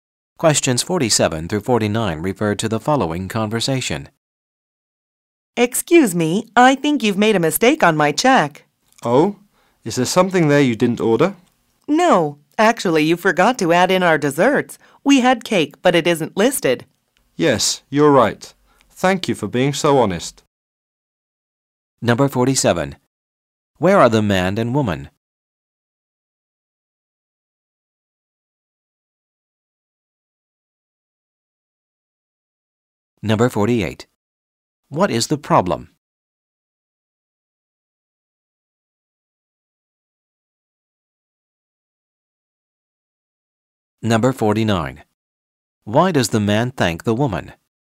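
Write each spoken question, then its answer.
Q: What is the problem?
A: The desserts were left off the check

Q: Why does the man thank the woman?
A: For being honest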